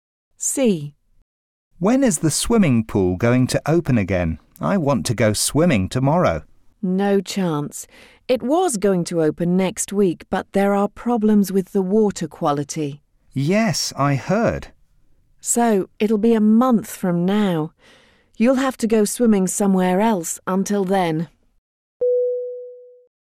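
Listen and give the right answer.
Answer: In a month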